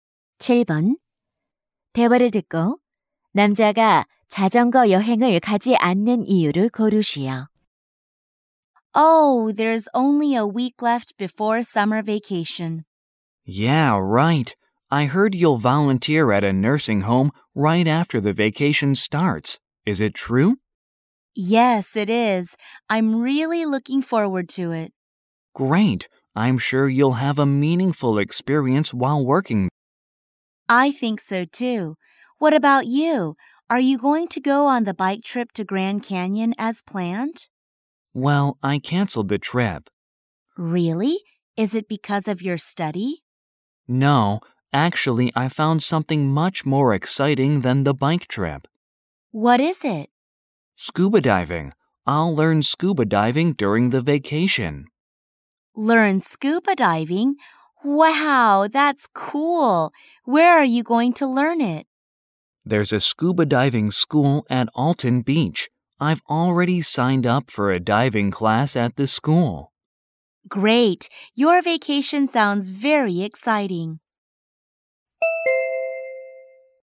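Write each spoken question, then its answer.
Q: 대화를 듣고 남자가 자전거 여행을 가지 않는 이유를 고르시오.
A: 방학 동안 스쿠버 다이빙을 배우기 때문에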